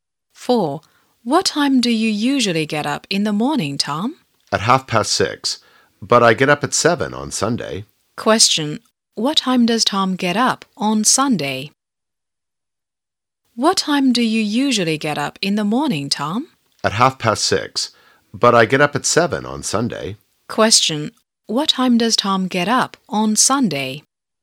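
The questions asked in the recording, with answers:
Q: what time does Tom get up on Sunday?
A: At 7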